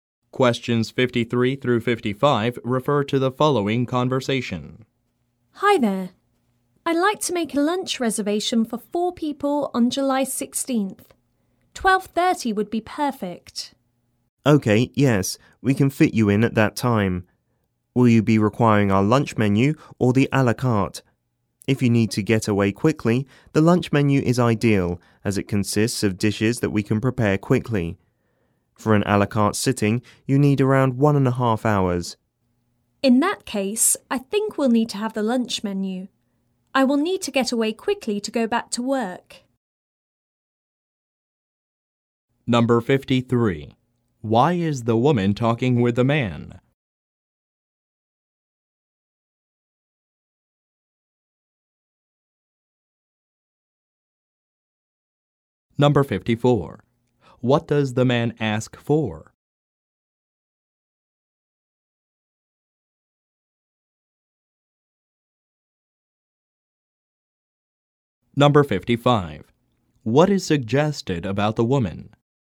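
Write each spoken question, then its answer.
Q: Why is the woman talking with the man?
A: To make a lunch reservation for 4 people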